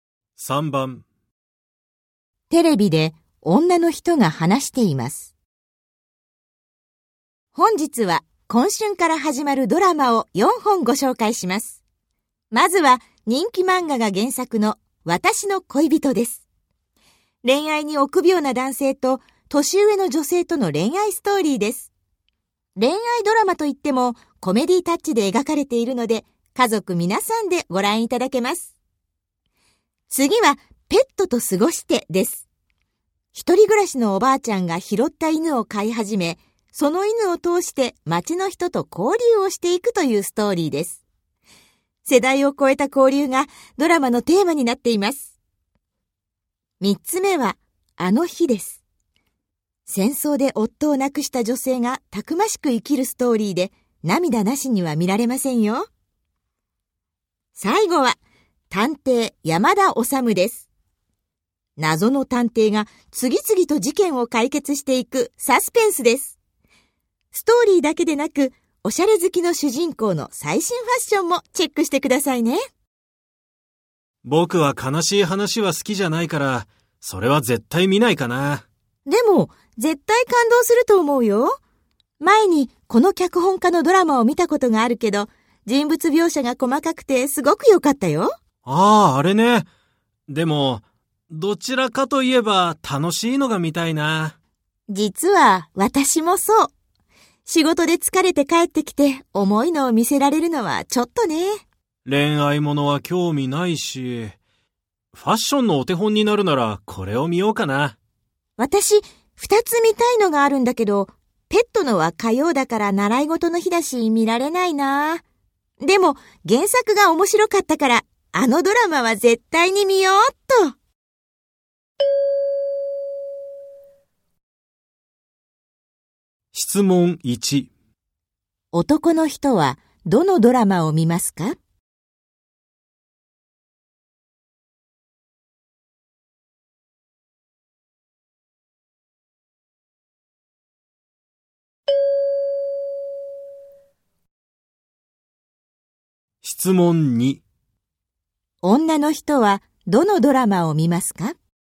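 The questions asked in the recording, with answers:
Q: 男の人はどのドラマを見ますか?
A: 探偵山田治

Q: 女の人はどのドラマを見ますか?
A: 私の恋人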